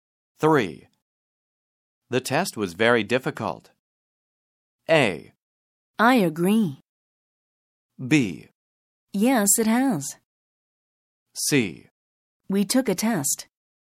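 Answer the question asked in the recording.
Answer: A: I agree.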